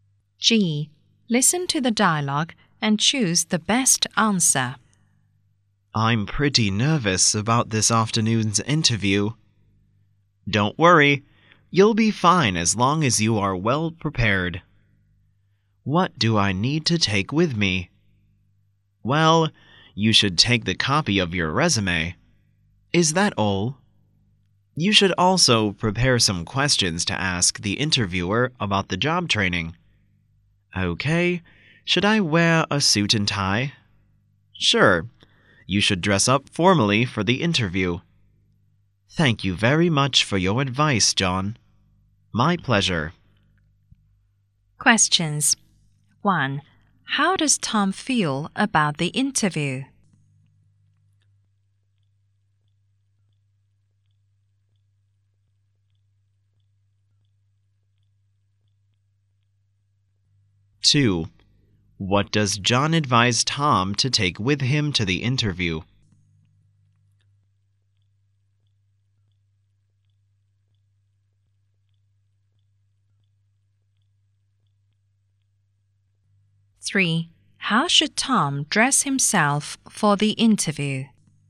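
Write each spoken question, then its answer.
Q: How does Tom feel about the interview?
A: Nervous

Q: What does John advise Tom to take with him to the interview?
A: A copy of his resume

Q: How should Tom dress himself for the interview?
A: Formally, in a suit and tie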